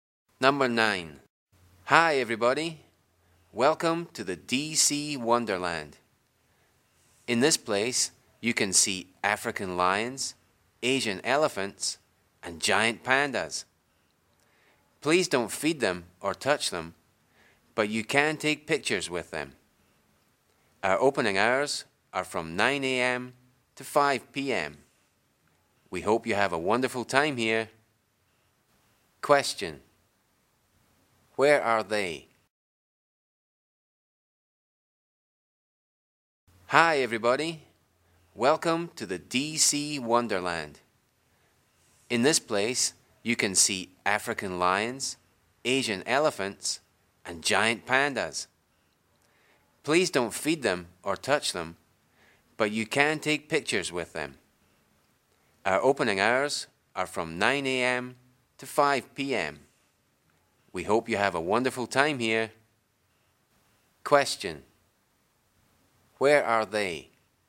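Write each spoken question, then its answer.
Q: Question. Where are they?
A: At a zoo (DC Wonderland)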